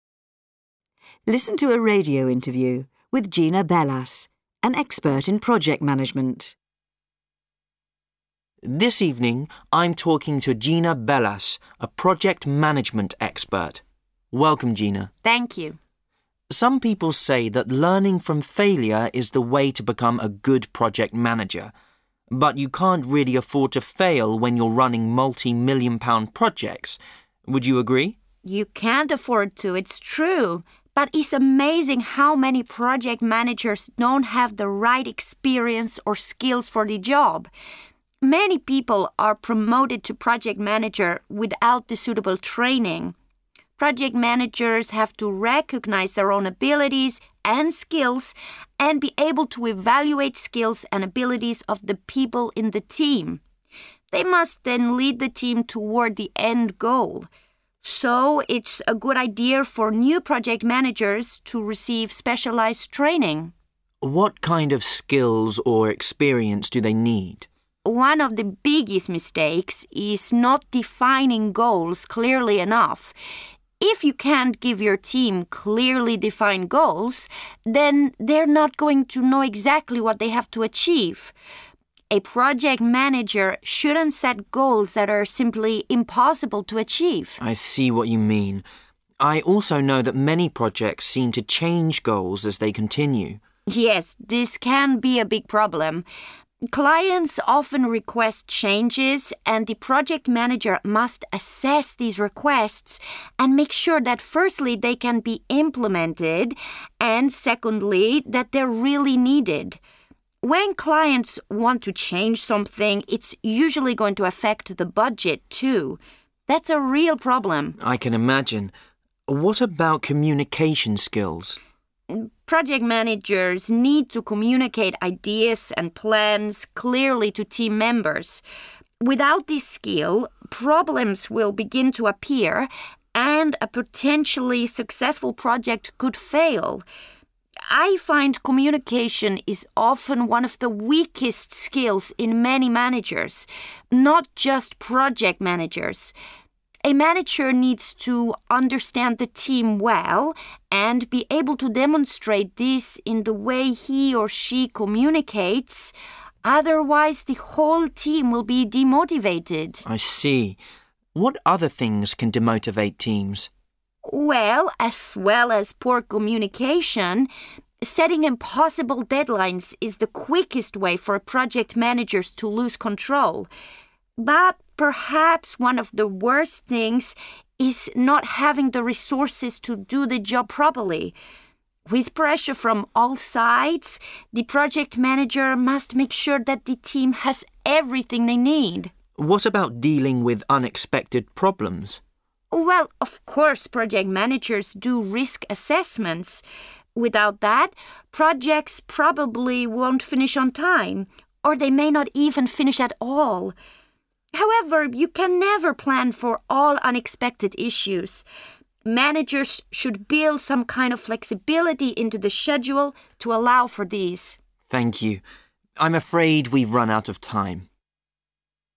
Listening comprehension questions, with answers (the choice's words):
3. Listen to a radio interview with Gina Velas, an expert in project management. Choose the correct option a, b or c.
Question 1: What does the interviewer say about failure?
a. It's a good way to learn.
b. You can't afford to fail.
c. It's caused by a lack of experience.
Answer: You can't afford to fail.

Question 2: What does Gina say about experience and skills?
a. Project managers must train their teams.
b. Teams must evaluate their own skills.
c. Project managers should have relevant training.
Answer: Project managers should have relevant training.

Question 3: Project managers should set goals that are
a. challenging.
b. clearly defined.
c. simple.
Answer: clearly defined.

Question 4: Why does Gina say about changing goals?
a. Clients are unable to assess them.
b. It often affects the budget.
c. Project managers like making changes.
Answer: It often affects the budget.

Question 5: What can poor communication skills lead to?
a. project failure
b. team disappointment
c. weak managers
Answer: project failure

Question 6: What else can demotivate a team?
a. pressure from other staff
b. not having enough resources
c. losing control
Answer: not having enough resources

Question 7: What does Gina say about unexpected problems?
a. Risk assessment predicts all problems.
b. Allow extra time for them.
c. Schedules are always flexible.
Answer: Allow extra time for them.

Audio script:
Listen to a radio interview with Gina Velas, an expert in project management.
I: This evening I'm talking to Gina Velas, a project management expert. Welcome, Gina.
G: Thank you.
I: Some people say that learning from failure is the way to become a good project manager. But you can't really afford to fail when you're running multi-million-pound projects, would you agree?
G: You can't afford to, it's true, but it's amazing how many project managers don't have the right experience or skills for the job. Many people are promoted to project manager without the suitable training. Project managers have to recognise their own abilities and skills and be able to evaluate skills and abilities of the people in the team. They must then lead the team toward the end goal. So it's a good idea for new project managers to receive specialised training.
I: What kind of skills or experience do they need?
G: One of the biggest mistakes is not defining goals clearly enough. If you can't give your team clearly defined goals, then they're not going to know exactly what they have to achieve. A project manager shouldn't set goals that are simply impossible to achieve.
I: I see what you mean. I also know that many projects seem to change goals as they continue.
G: Yes, this can be a big problem. Clients often request changes and the project manager must assess these requests and make sure that, firstly, they can be implemented and, secondly, that they're really needed. When clients want to change something, it's usually going to affect the budget, too. That's a real problem.
I: I can imagine. What about communication skills?
G: Project managers need to communicate ideas and plans clearly to team members. Without this skill, problems will begin to appear and a potentially successful project could fail. I find communication is often one of the weakest skills in many managers, not just project managers. A manager needs to understand the team well and be able to demonstrate this in the way he or she communicates; otherwise the whole team will be demotivated.
I: I see. What other things can demotivate teams?
G: Well, as well as poor communication, setting impossible deadlines is the quickest way for project managers to lose control. But perhaps one of the worst things is not having the resources to do the job properly. With pressure from all sides, the project manager must make sure that the team has everything they need.
I: What about dealing with unexpected problems?
G: Well, of course project managers do risk assessments. Without that, projects probably won't finish on time, or they may not even finish at all. However, you can never plan for all unexpected issues; managers should build some kind of flexibility into the schedule to allow for these.
I: Thank you. I'm afraid we've run out of time.